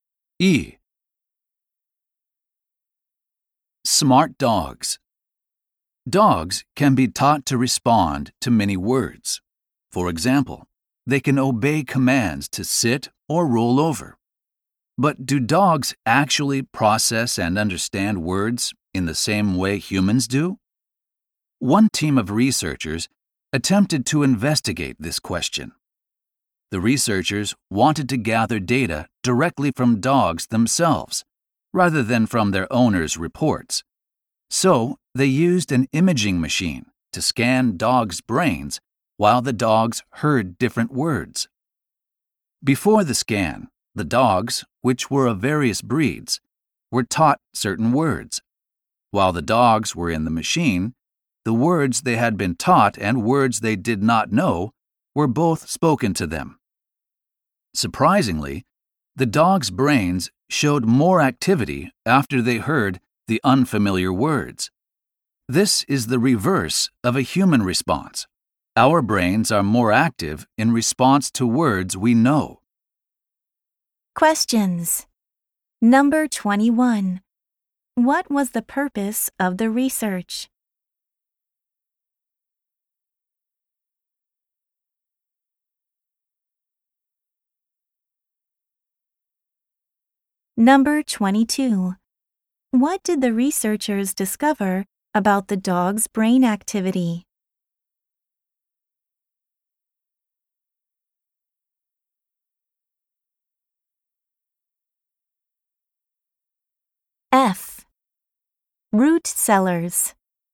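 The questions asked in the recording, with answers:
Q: What was the purpose of the research?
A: To find out if dogs process and understand words the way humans do

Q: What did the researchers discover about the dog's brain activity?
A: It was higher in response to unfamiliar words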